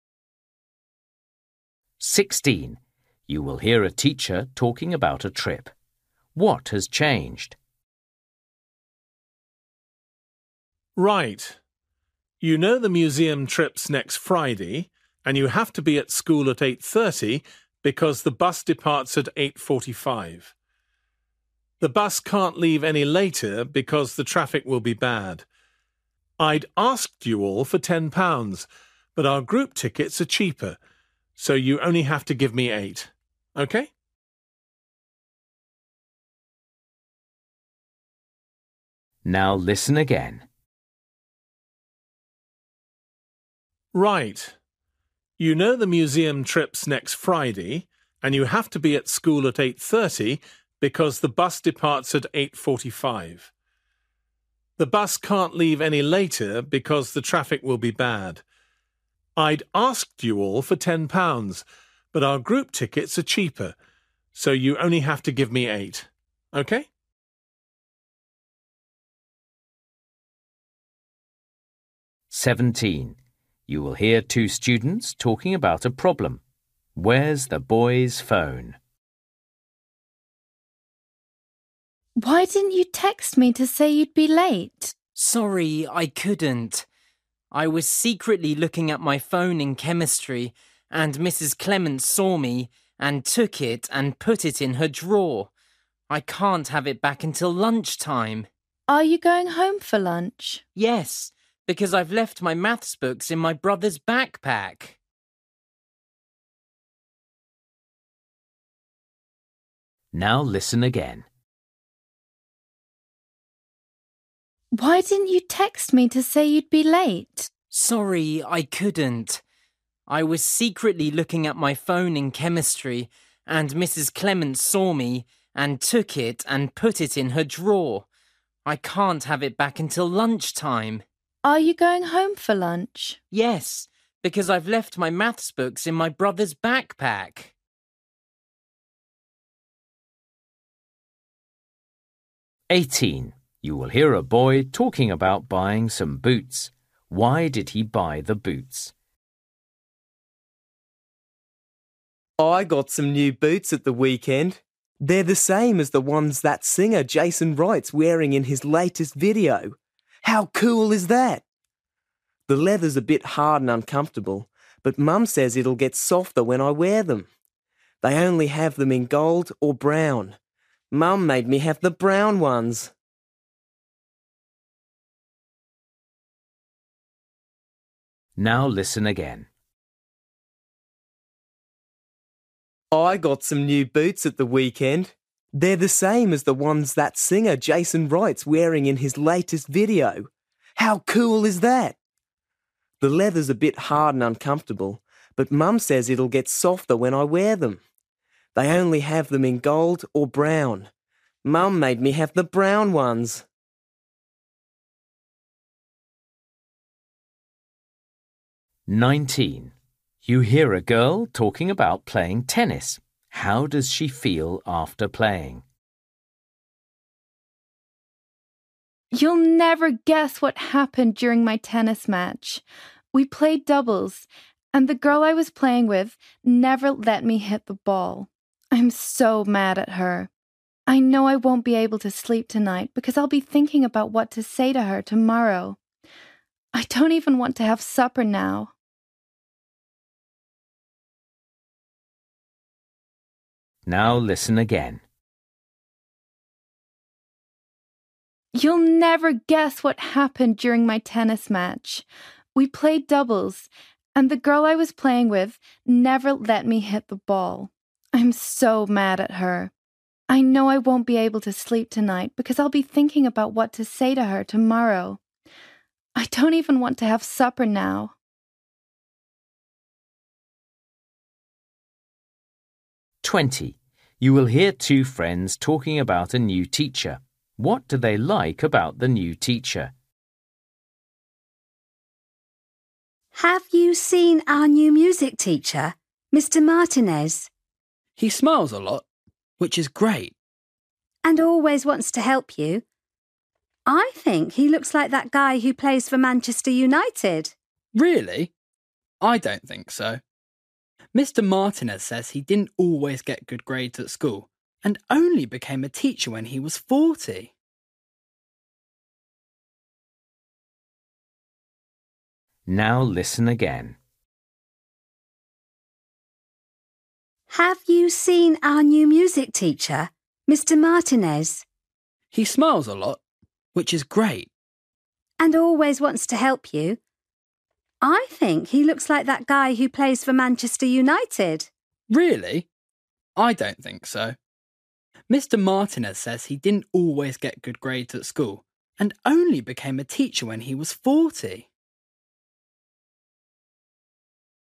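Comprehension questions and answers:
For each question, choose the correct answer.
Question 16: You will hear a teacher talking about a trip. What has changed?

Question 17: You will hear two students talking about a problem. Where's the boy's phone?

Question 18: You will hear a boy talking about buying some boots. Why did he buy the boots?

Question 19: You will hear a girl talking about playing tennis. How does she feel after playing?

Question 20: You will hear two friends talking about a new teacher. What do they like about the new teacher?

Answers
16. the price: students pay £8 instead of £10
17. in the teacher's (Mrs Clements') drawer
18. a singer he likes wears the same ones
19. angry
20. he is friendly and helpful (smiles a lot, always wants to help)

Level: Luyện nghe trình độ A2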